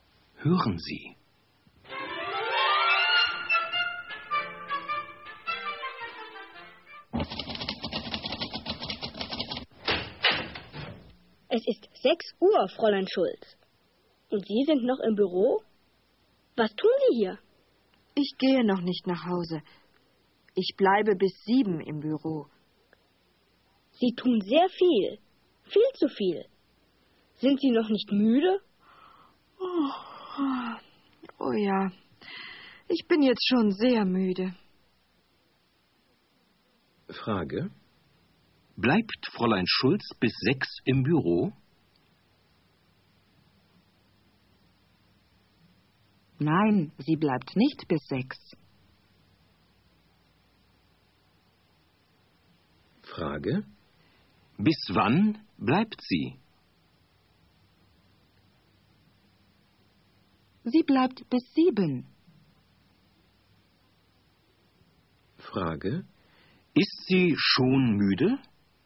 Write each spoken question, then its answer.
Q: Frage: Bleibt Fräulein Schulz bis 6 im Büro?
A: Nein, sie bleibt nicht bis 6.

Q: Frage: Ist sie schon müde?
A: Ja, sie ist schon sehr müde.